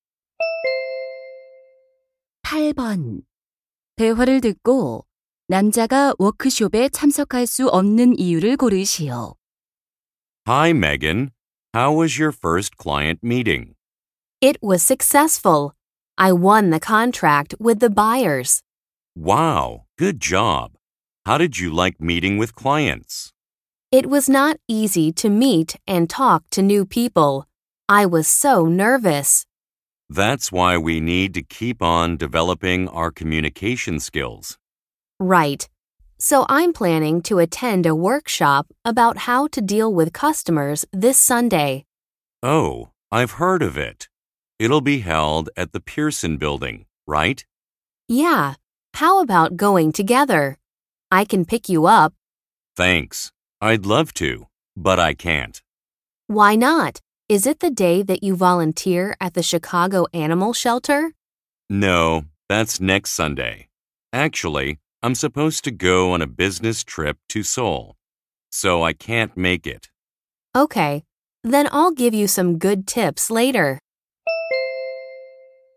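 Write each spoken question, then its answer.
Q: 대화를 듣고 남자가 워크숍에 참석할 수 없는 이유를 고르시오.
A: 서울로 출장을 가야 해서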